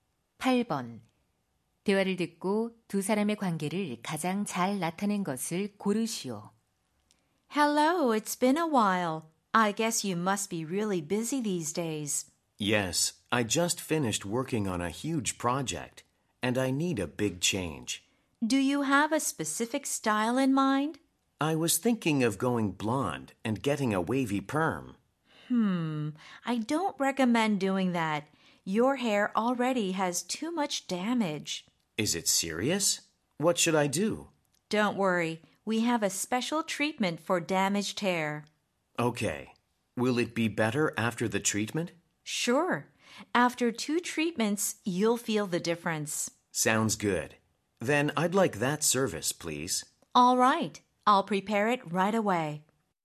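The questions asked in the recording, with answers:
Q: 대화를 듣고 두 사람의 관계를 가장 잘 나타낸 것을 고르시오.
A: 미용사 - 손님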